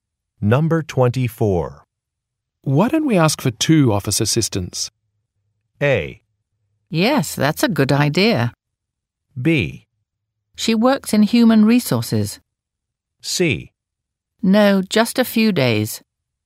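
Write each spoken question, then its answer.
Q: Why don't we ask for two office assistants?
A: A: Yes, that's a good idea.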